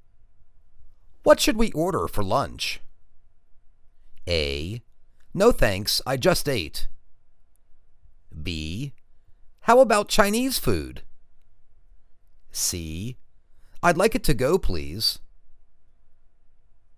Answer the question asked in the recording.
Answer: How about Chinese food?